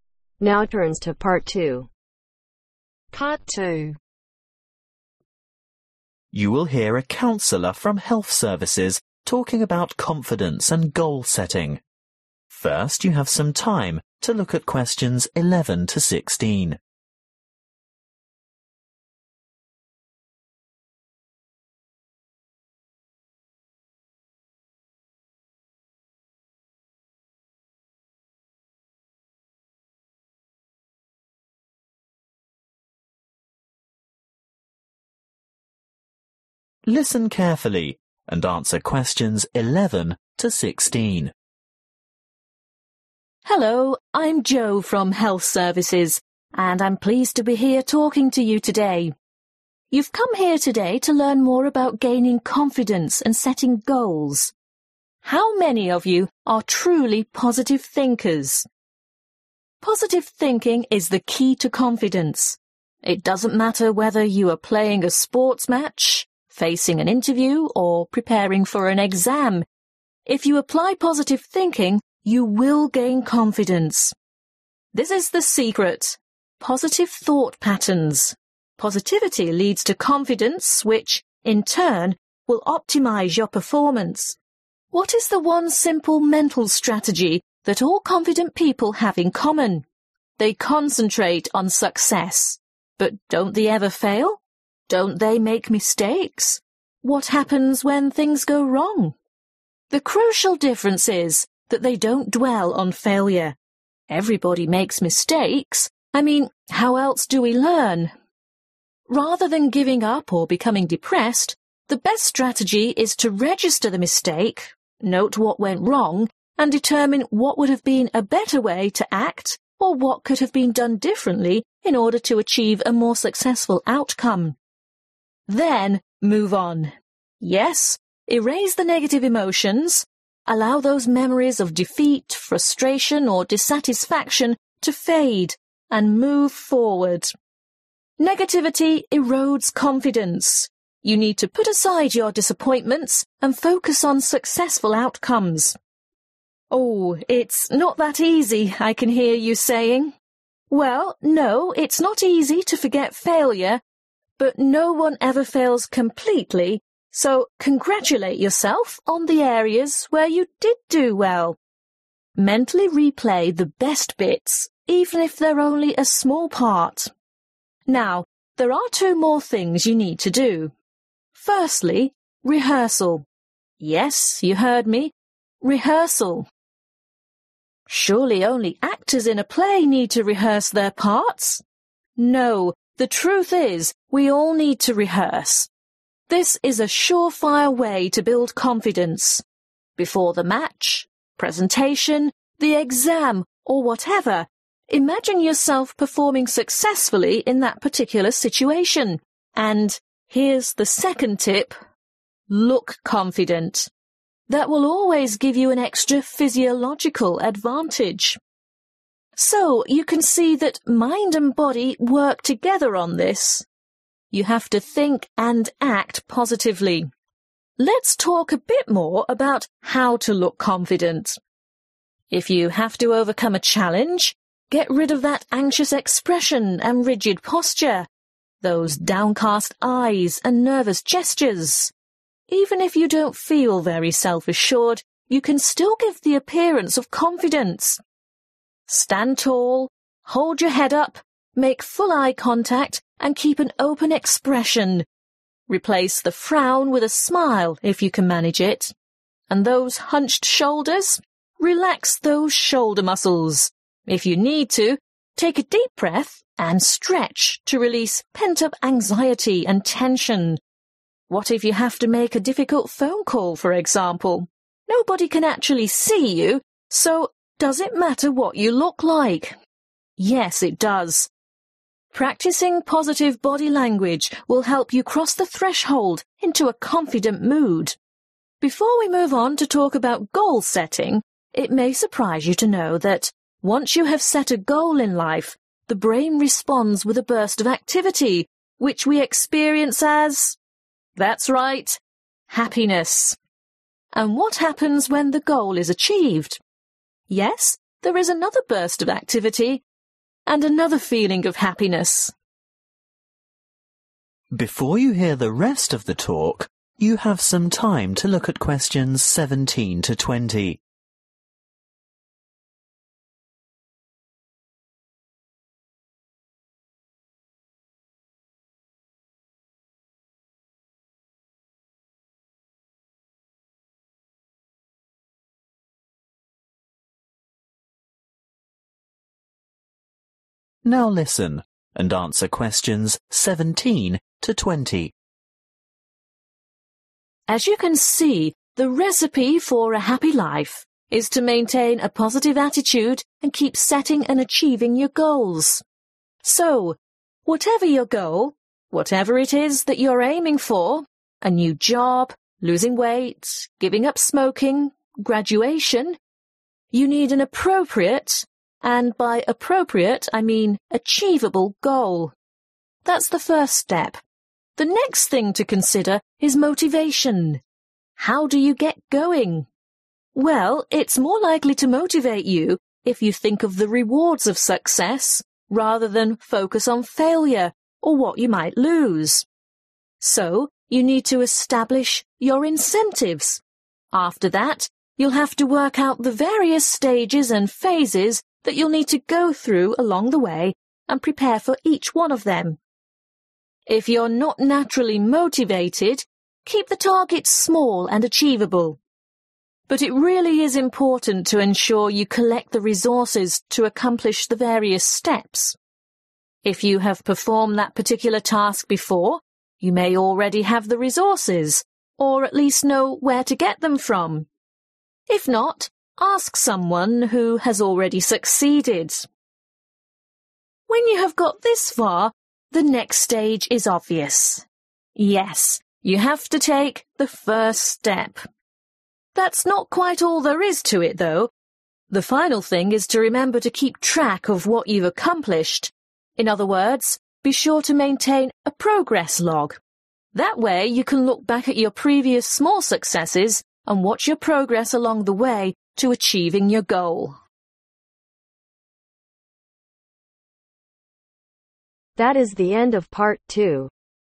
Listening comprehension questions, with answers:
Complete the sentences below. Write NO MORE THAN TWO WORDS for each answer.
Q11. You can become more confident by using ............ .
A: Positive thinking/thought(s)

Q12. More confidence results in better ............ .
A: Performance

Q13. A good strategy to build confidence is to get rid a negative memories of mistakes and failures and, instead, concentrate on ............ .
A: Successful outcomes

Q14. Frequent ............ of positive imagery is necessary for success.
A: Rehearsal

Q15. Mental Positivity is not enough-you also have to act in a confident manner-so ............ is important too.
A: Body language

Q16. Setting and achieving goals results in brain activity that brings about an experience of ............ .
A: Happiness

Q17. Set an (17)............ goal.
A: Appropriate/achievable

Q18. (18)............ steps along the way.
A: Work out/prepare (for)

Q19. Gather (19)............ .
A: Resources

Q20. Keep a (20)............ .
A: Progress log